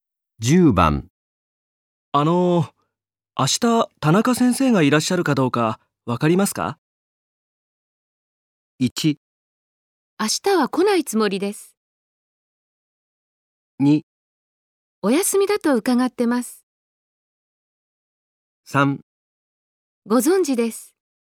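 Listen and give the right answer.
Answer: 2: お休みだと伺ってます。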